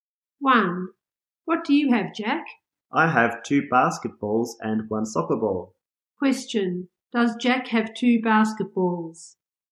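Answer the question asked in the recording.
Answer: Yes, he does.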